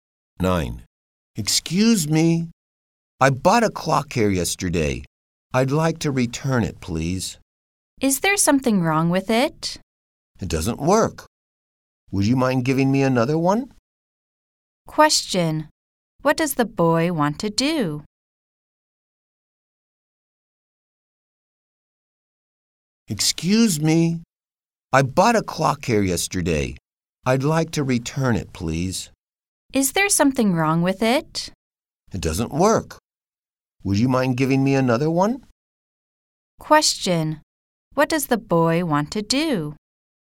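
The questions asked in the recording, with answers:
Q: What does the boy want to do?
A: Exchange the clock for another one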